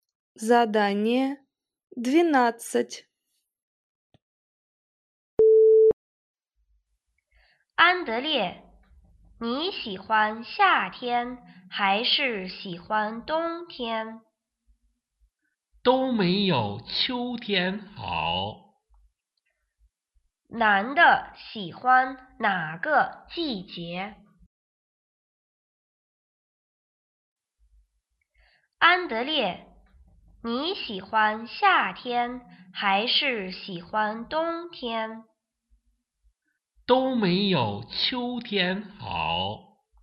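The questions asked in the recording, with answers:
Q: 男的喜欢哪个季节?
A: 秋天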